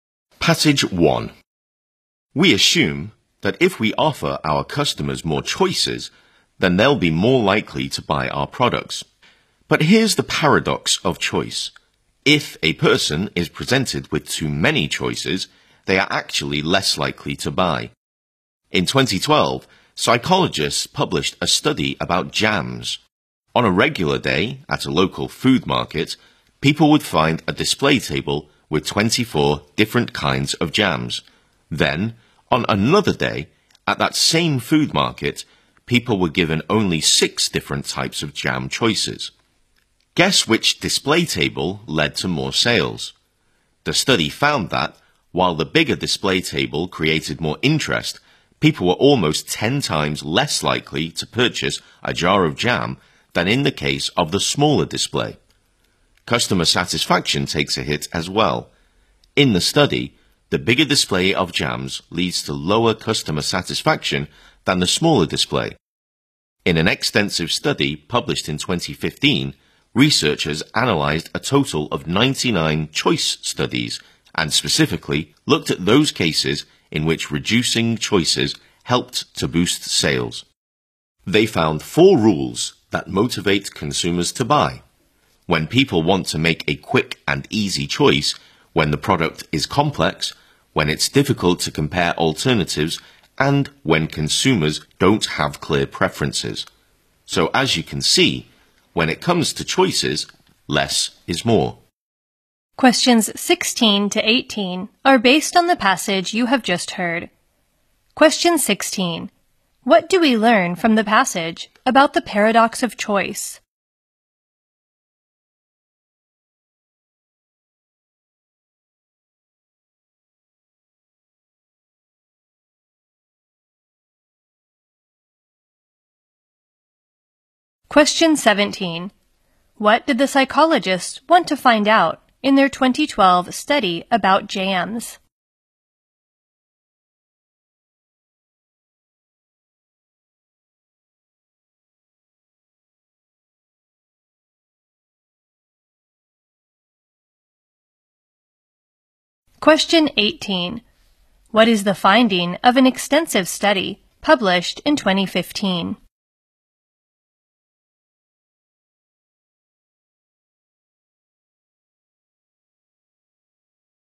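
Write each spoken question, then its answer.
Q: What do we learn from the passage about the paradox of choice?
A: With too many choices people are less likely to buy

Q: What did the psychologists want to find out in their 2012 study about jams?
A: Whether more or fewer choices lead to more sales

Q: What is the finding of an extensive study published in 2015?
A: Four rules under which reducing choices motivates consumers to buy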